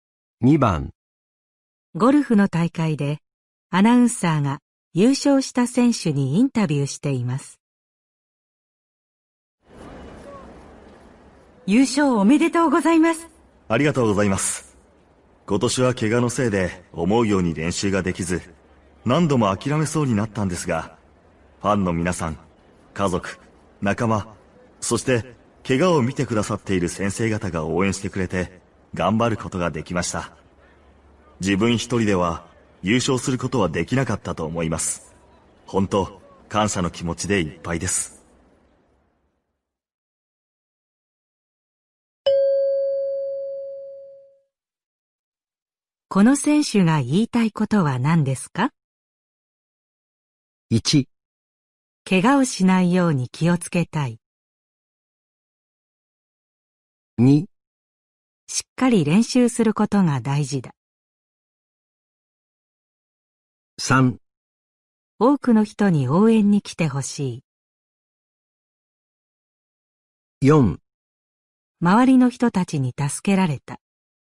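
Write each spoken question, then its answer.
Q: この選手が言いたいことは何ですか?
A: 4: 周りの人たちに助けられた。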